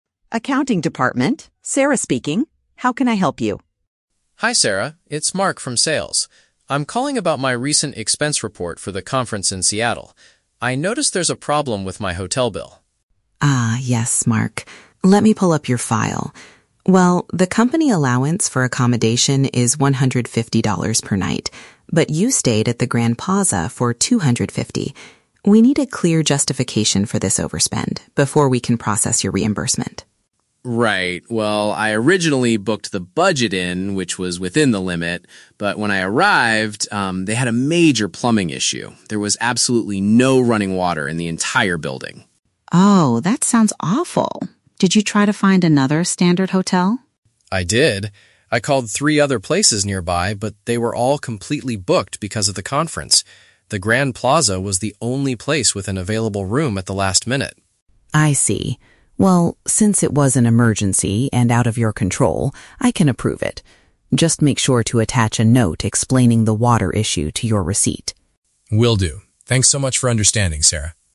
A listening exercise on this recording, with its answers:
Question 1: Why is the accounting department questioning Mark's expense report?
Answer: His hotel bill was higher than the company's budget limit.

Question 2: What was the problem with Mark's original hotel?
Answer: It experienced a severe issue with its water supply.

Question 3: What does Sarah ask Mark to do so he can get his money back?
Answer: Include a written explanation with his documents.

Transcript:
Sarah: Accounting department, Sarah speaking. How can I help you?
Mark: Hi Sarah, it's Mark from Sales. I'm calling about my recent expense report for the conference in Seattle. I noticed there's a problem with my hotel bill.
Sarah: Ah, yes, Mark. Let me pull up your file. Well, the company allowance for accommodation is $150 per night, but you stayed at the Grand Plaza for $250. We need a clear justification for this overspend before we can process your reimbursement.
Mark: Right. Well, I originally booked the Budget Inn, which was within the limit. But when I arrived, um, they had a major plumbing issue. There was absolutely no running water in the entire building.
Sarah: Oh, that sounds awful. Did you try to find another standard hotel?
Mark: I did! I called three other places nearby, but they were all completely booked because of the conference. The Grand Plaza was the only place with an available room at the last minute.
Sarah: I see. Well, since it was an emergency and out of your control, I can approve it. Just make sure to attach a note explaining the water issue to your receipt.